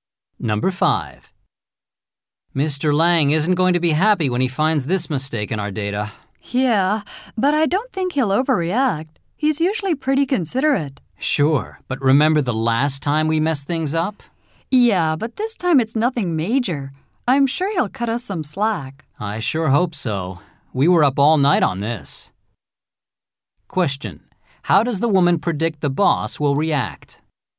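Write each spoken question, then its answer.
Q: How does the woman predict the boss will react?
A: She thinks he won't overreact and will go easy on them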